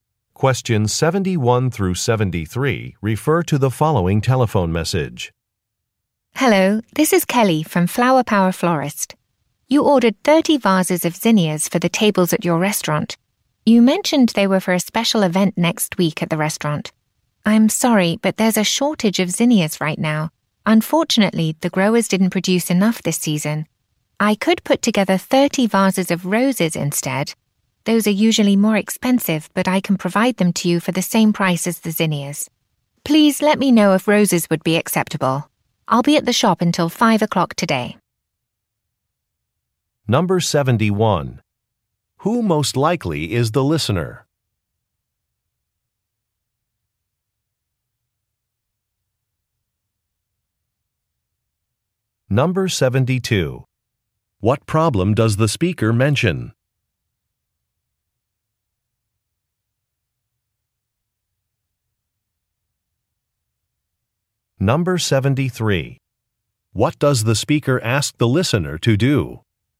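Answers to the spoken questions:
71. A restaurant owner
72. There is a shortage of zinnias
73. Let her know if roses would be acceptable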